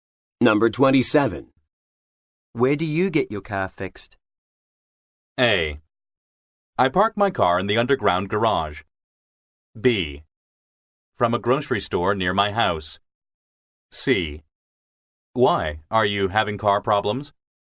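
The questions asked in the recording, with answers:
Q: Where do you get your car fixed?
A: C: Why? Are you having car problems?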